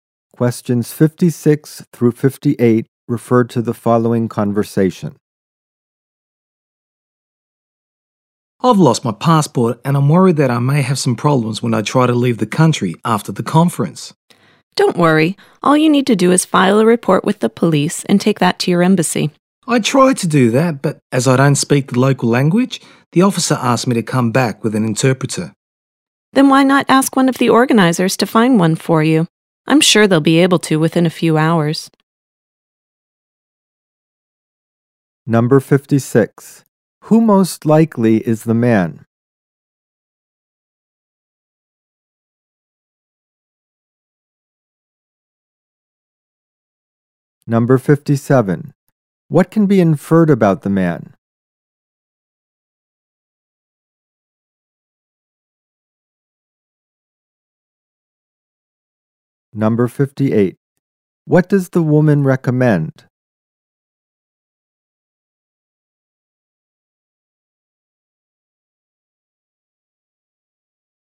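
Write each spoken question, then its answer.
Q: Who most likely is the man?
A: A foreign visitor attending a conference

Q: What can be inferred about the man?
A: He doesn't speak the local language

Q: What does the woman recommend?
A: Asking the conference organizers to find an interpreter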